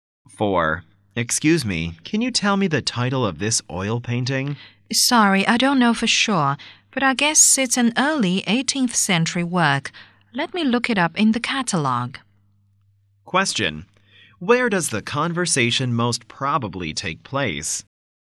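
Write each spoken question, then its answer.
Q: Where does the conversation most probably take place?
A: In an art gallery or museum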